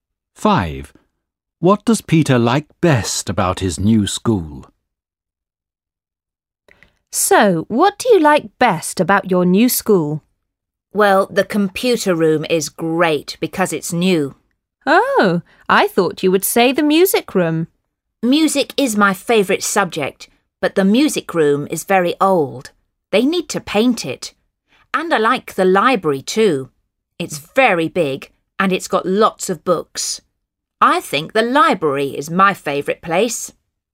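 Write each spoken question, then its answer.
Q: What does Peter like best about his new school?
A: The library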